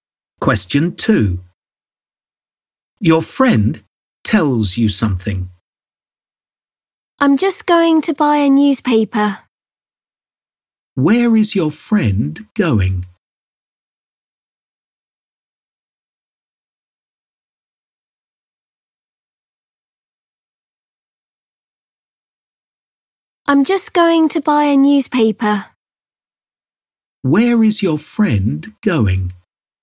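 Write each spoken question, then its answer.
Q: Where is your friend going?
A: To buy a newspaper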